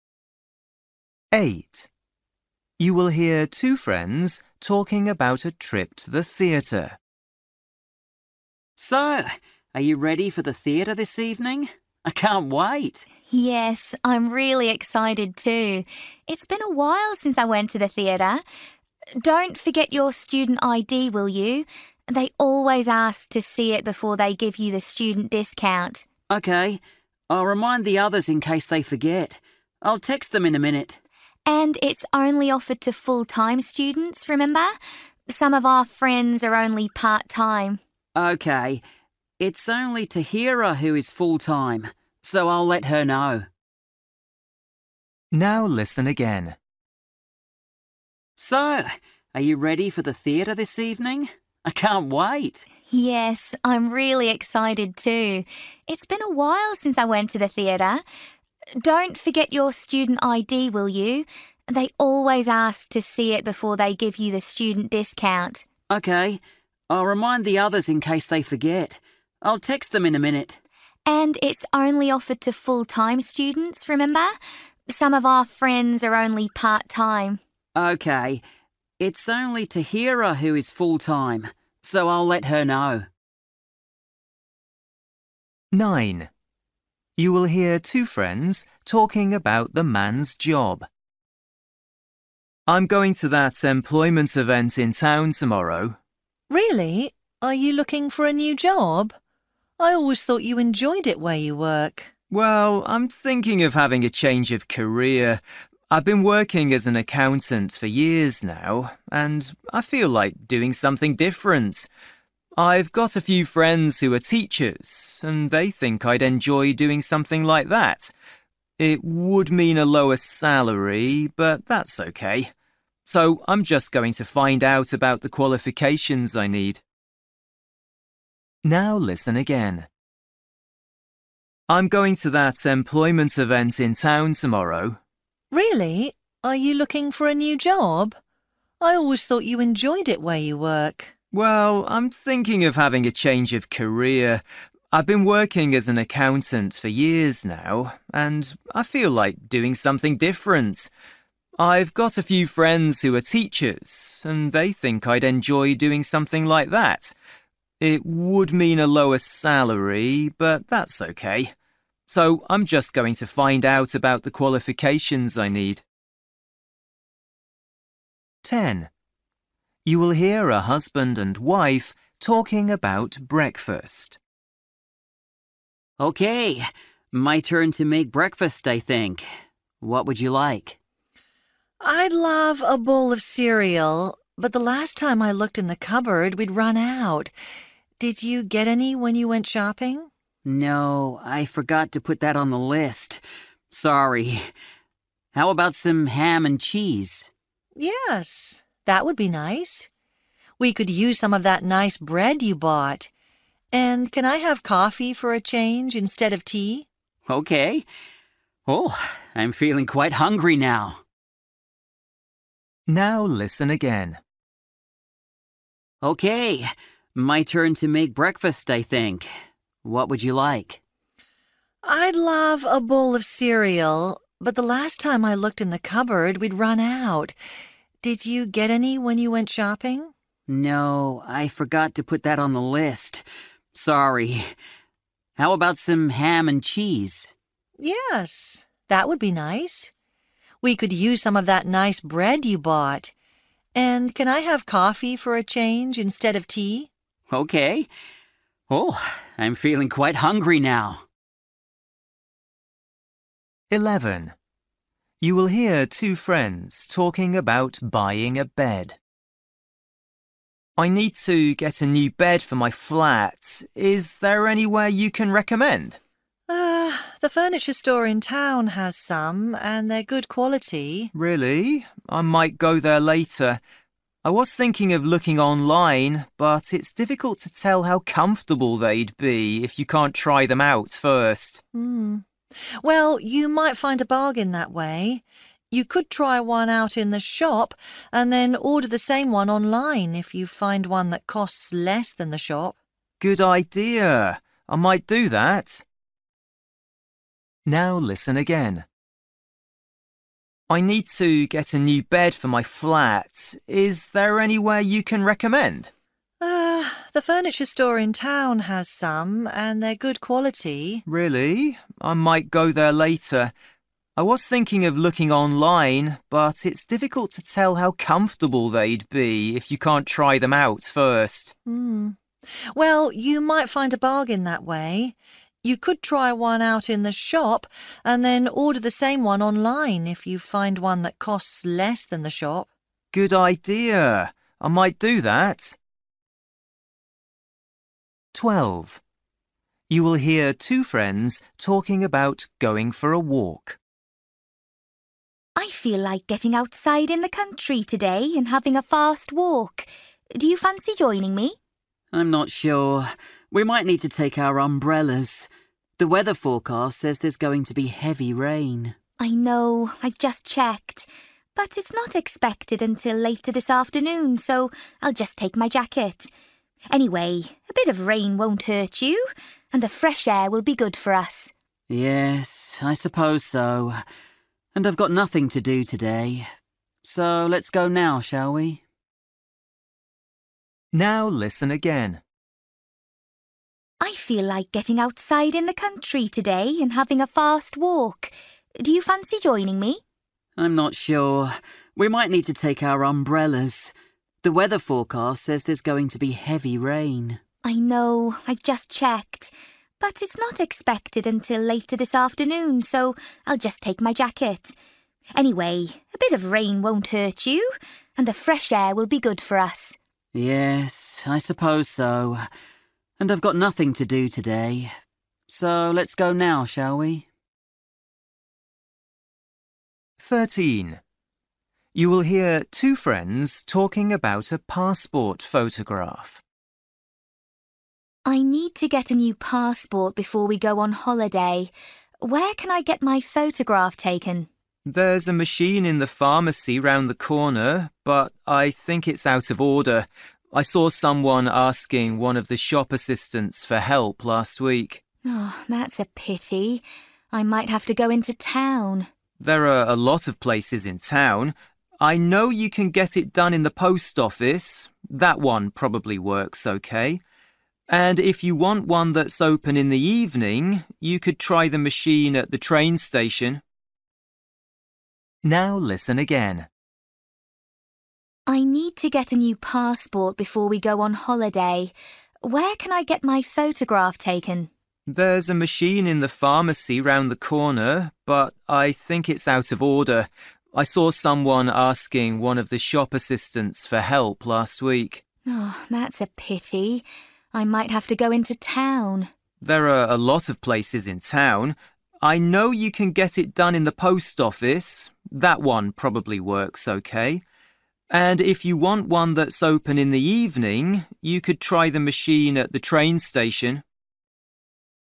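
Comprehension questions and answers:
For each question, choose the correct answer.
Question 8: You will hear two friends talking about a trip to the theatre. What does the woman say about it?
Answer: Only full-time students get the discount, so only Tahira needs reminding.

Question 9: You will hear two friends talking about the man's job. The man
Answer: is thinking of changing career to teaching.

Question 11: You will hear two friends talking about buying a bed. The woman thinks the ones online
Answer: might be cheaper.

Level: Luyện nghe trình độ B1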